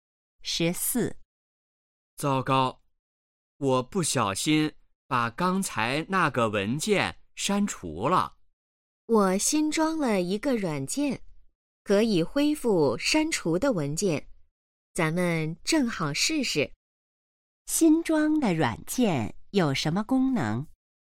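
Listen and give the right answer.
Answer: 可以恢复删除的文件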